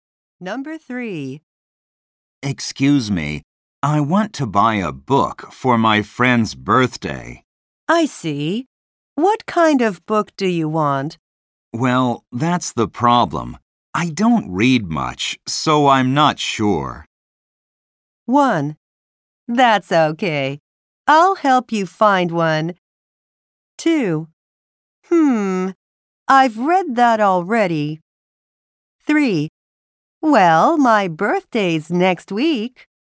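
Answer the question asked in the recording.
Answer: 1: That's okay. I'll help you find one.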